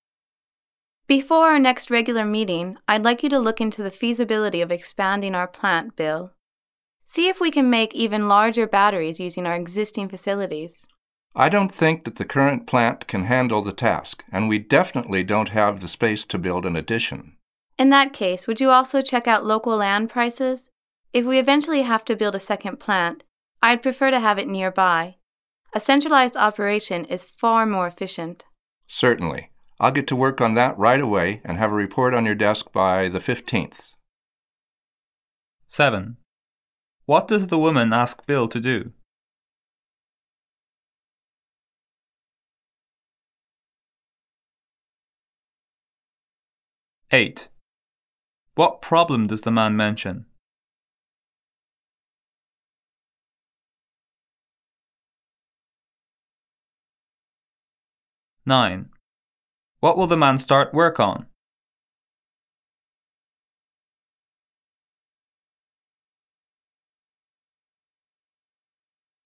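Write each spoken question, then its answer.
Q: What does the woman ask Bill to do?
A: Look into the feasibility of expanding the plant

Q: What problem does the man mention?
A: The current plant can't handle the task and there's no space to build an addition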